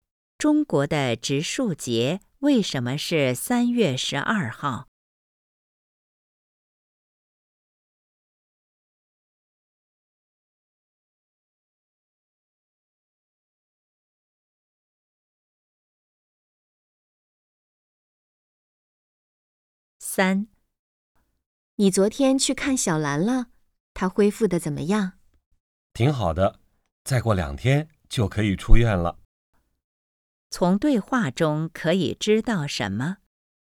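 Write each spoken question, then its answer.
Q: 从对话中可以知道什么?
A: 小兰恢复得挺好,再过2天就可以出院了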